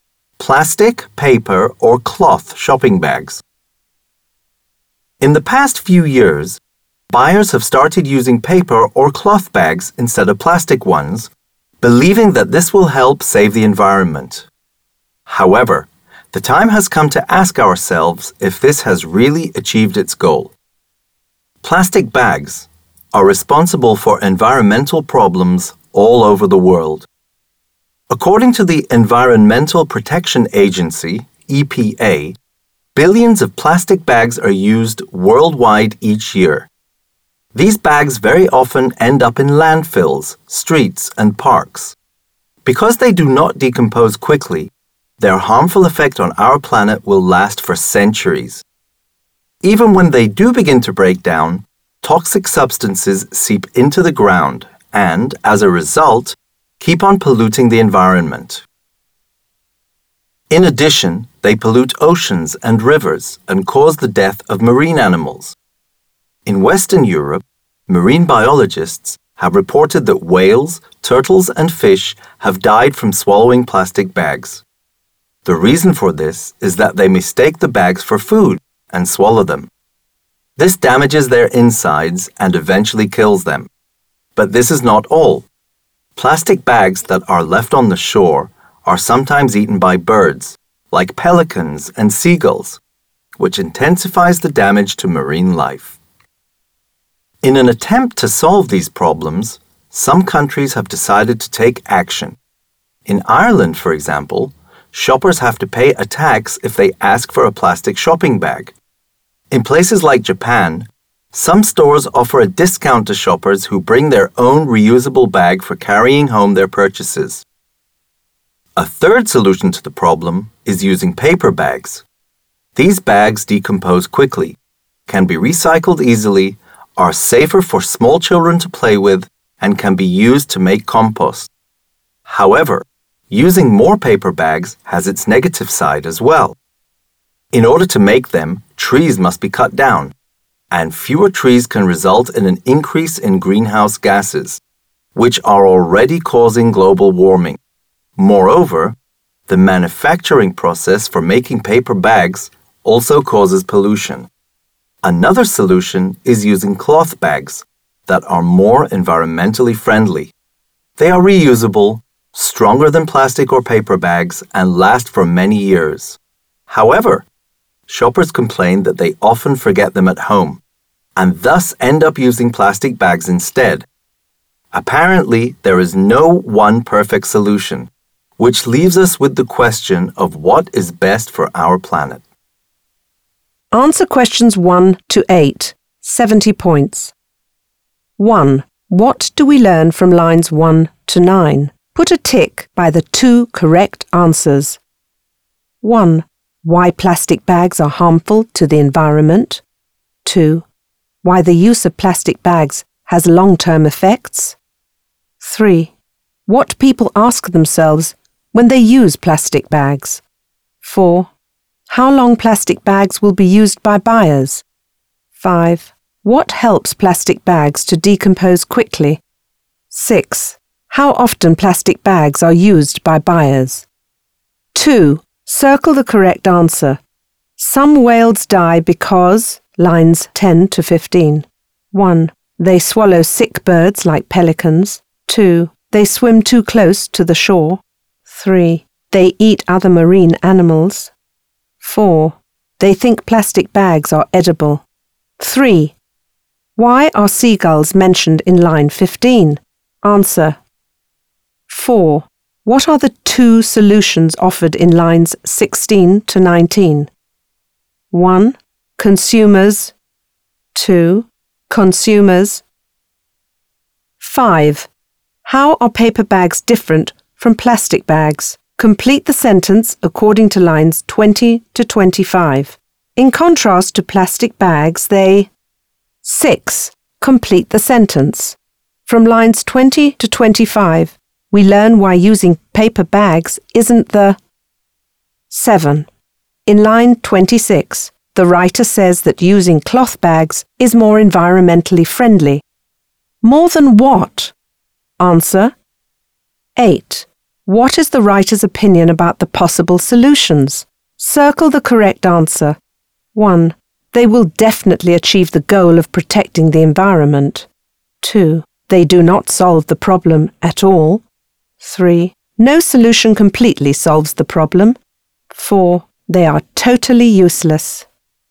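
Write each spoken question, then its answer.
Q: What do we learn from lines 1 to 9?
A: 1: Why plastic bags are harmful to the environment; 2: Why the use of plastic bags has long-term effects

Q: Some whales die because, lines 10 to 15.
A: 4: They think plastic bags are edible.

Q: Why are seagulls mentioned in line 15?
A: They eat plastic bags left on the shore, which adds to the damage to marine life

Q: What is the writer's opinion about the possible solutions?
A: 3: No solution completely solves the problem.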